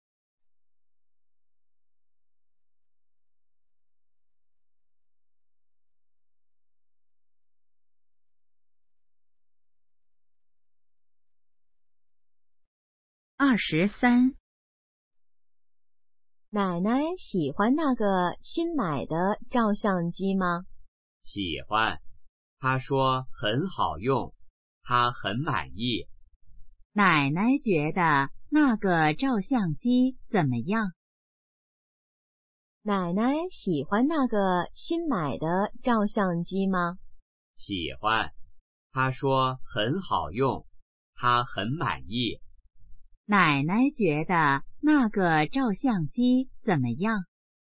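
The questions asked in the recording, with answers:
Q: 奶奶觉得那个照相机怎么样?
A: 很满意,很好用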